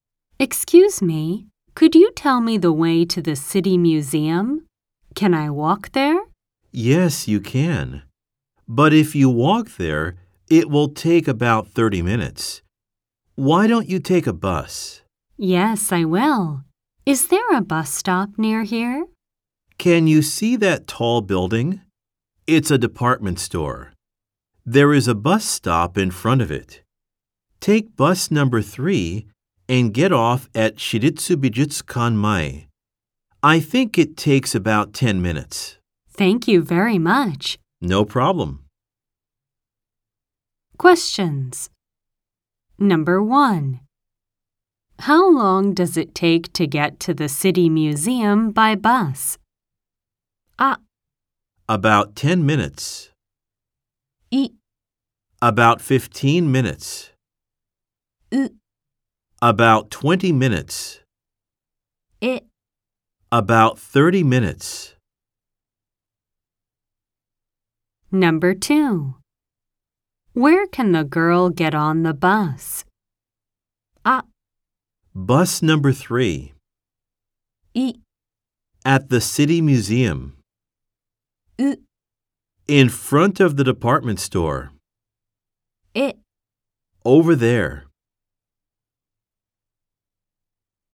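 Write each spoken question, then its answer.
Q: How long does it take to get to the City Museum by bus?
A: あ: About 10 minutes.

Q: Where can the girl get on the bus?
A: う: In front of the department store.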